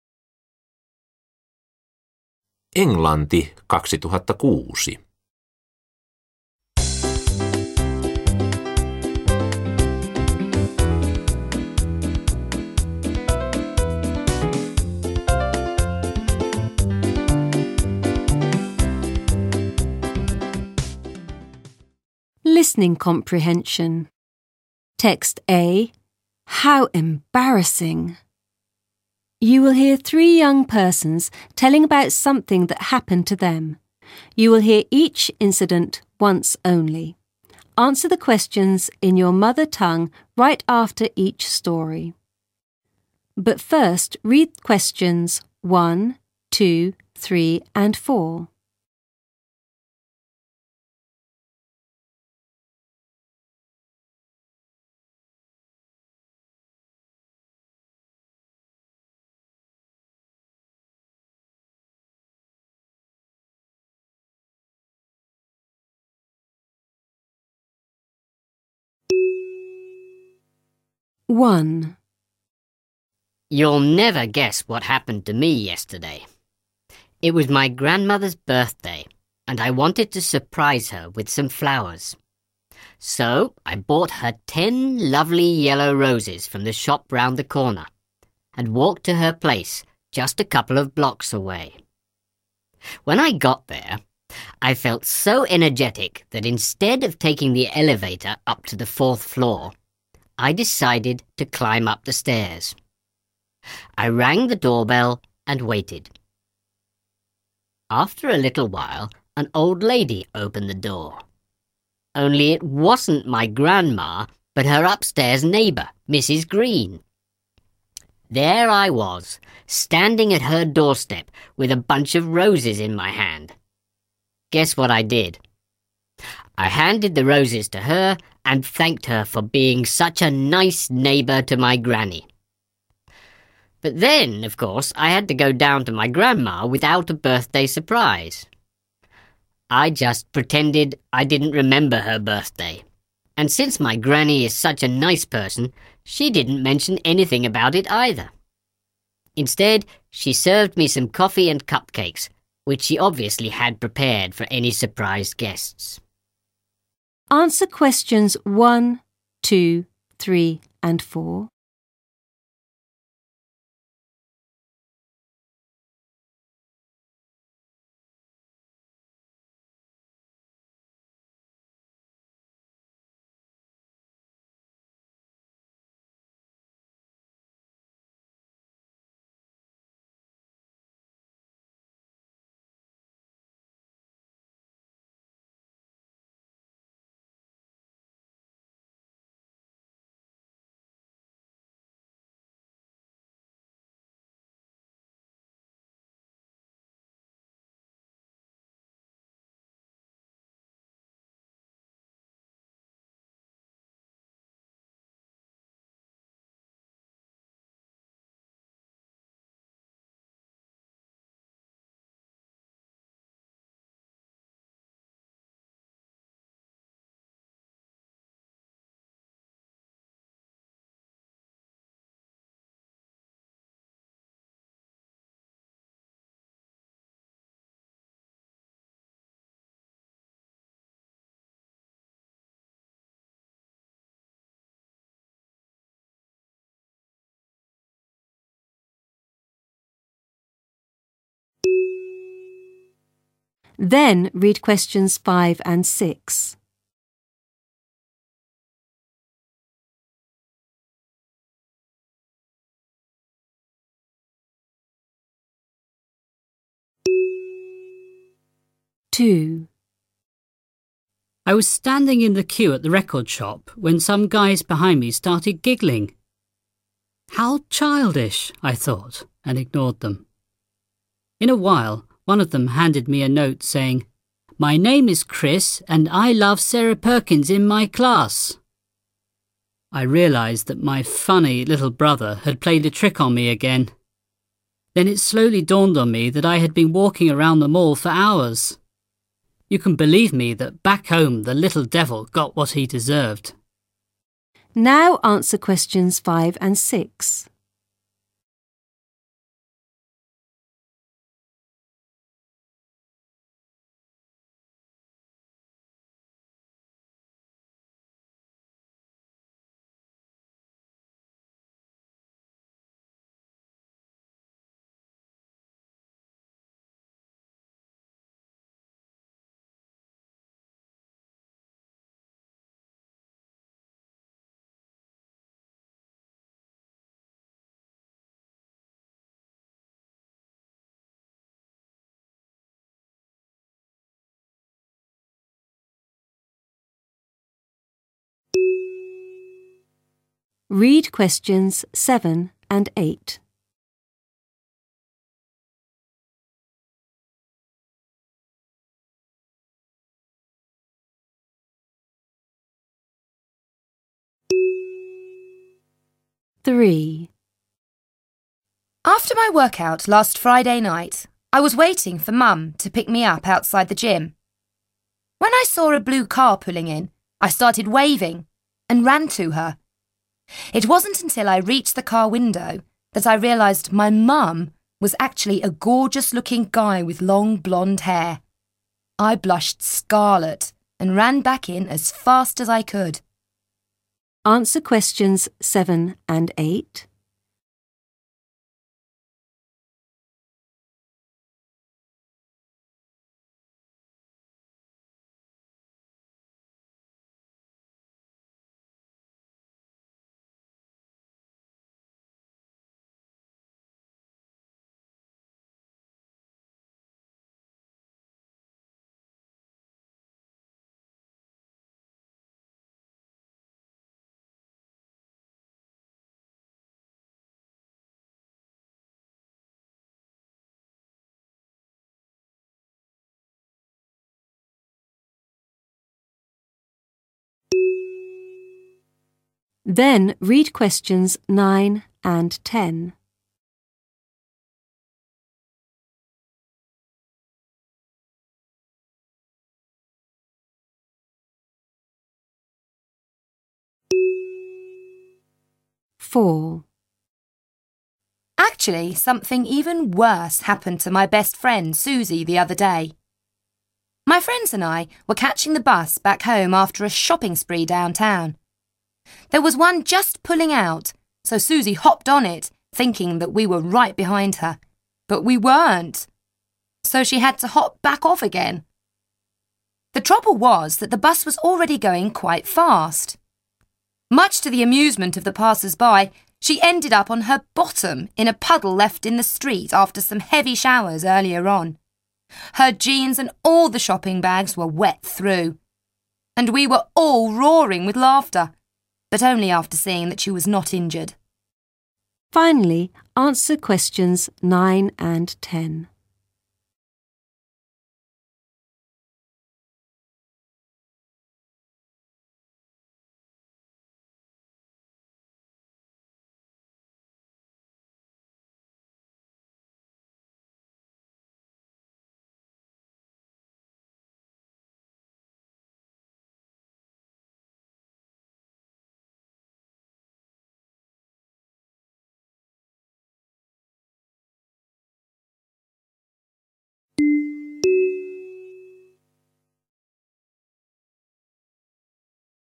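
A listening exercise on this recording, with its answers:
Jatka lauseita suomeksi:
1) Kertoja osti kimpun ruusuja, joilla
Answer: halusi yllättää isoäitinsä tämän syntymäpäivänä

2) Kertojan hämmästykseksi oven avasi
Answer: isoäidin yläkerran naapuri, rouva Green

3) Oven auettua kertoja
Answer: antoi ruusut naapurille ja kiitti tätä siitä, että on niin mukava naapuri isoäidille

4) Isoäidin luona kertoja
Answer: teeskenteli, ettei muistanut syntymäpäivää, ja sai kahvia ja kuppikakkuja

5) Lapussa luki pojan nimi ja että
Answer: hän rakastaa luokkatoveriaan Sarah Perkinsiä

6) Palauttuaan kotiin Chris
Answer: sai pikkuveljelle ansionsa mukaan

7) Kertoja erehtyi luulemaan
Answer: komeaa pitkähiuksista vaaleaa miestä sinisessä autossa äidikseen

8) Kun tilanne selvisi hänelle, hän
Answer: punastui ja juoksi takaisin sisään

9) Suzy hyppäsi pois liikkuvasta bussista, koska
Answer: ystävät eivät olleetkaan tulleet hänen perässään bussiin

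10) Kaverit nauroivat, sillä hän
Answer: kaatui takamukselleen vesilätäkköön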